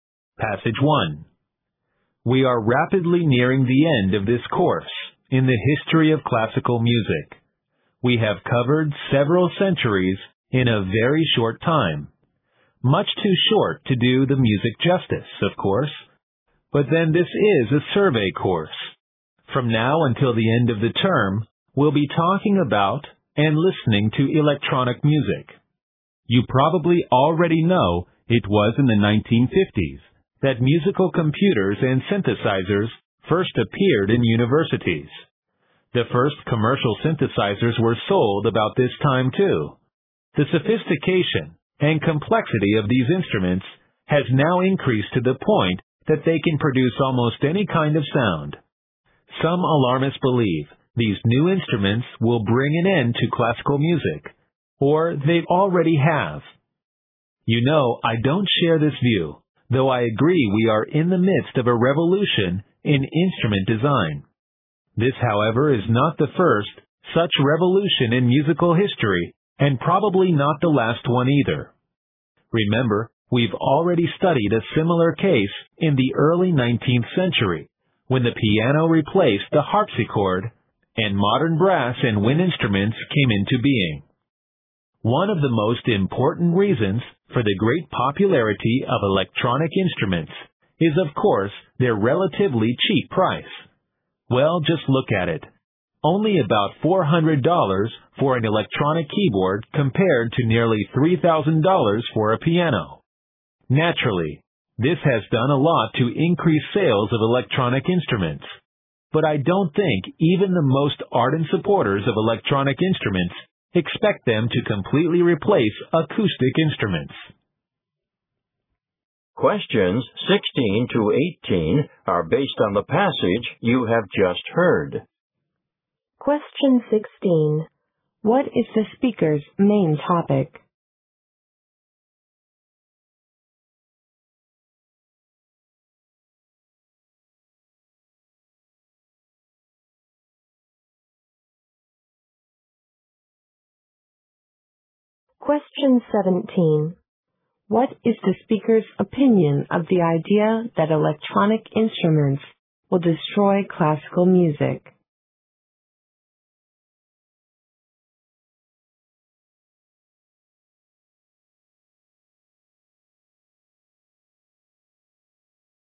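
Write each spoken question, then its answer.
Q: What is the speaker's main topic?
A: Electronic music and electronic instruments.

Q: What is the speaker's opinion of the idea that electronic instruments will destroy classical music?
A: He disagrees with it.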